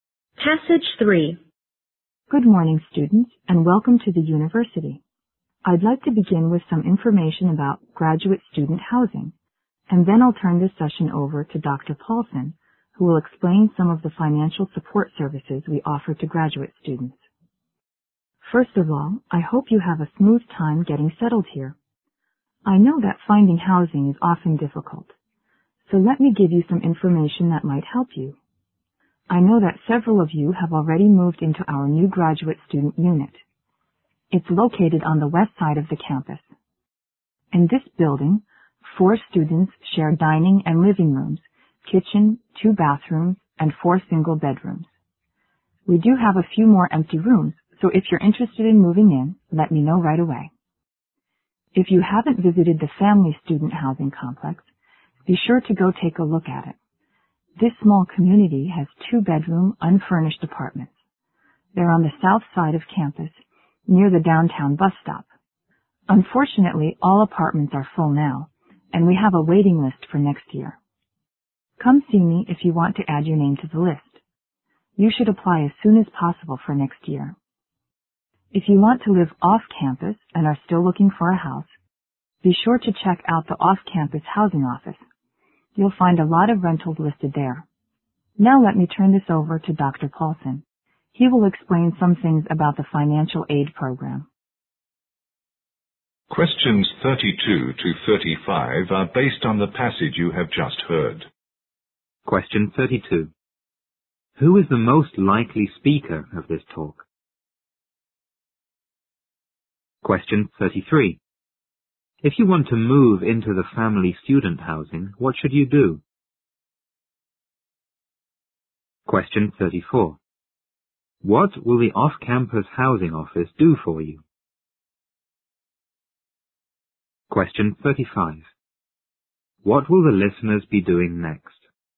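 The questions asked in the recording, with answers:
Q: If you want to move into the family student housing, what should you do?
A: Put your name on the waiting list as soon as possible

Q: What will the off-campus housing office do for you?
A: Show you many listed rentals

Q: What will the listeners be doing next?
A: Listening to Dr. Paulson explain financial aid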